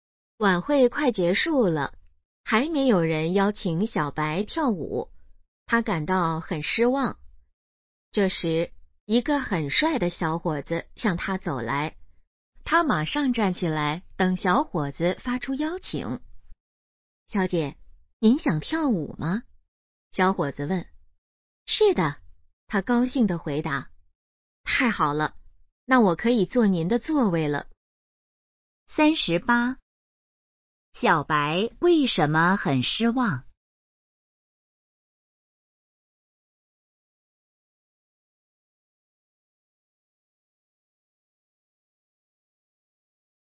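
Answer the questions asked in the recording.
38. 没有人邀请她跳舞
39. 坐她的座位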